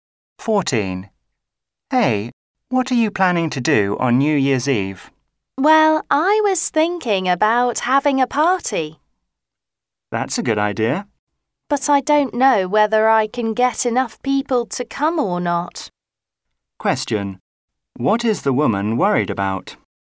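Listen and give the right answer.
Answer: Whether enough people will come to her party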